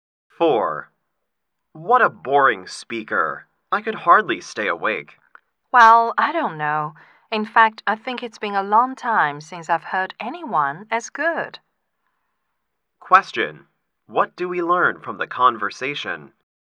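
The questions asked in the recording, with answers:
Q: What do we learn from the conversation?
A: The speakers disagree; one found the speaker boring, the other found him very good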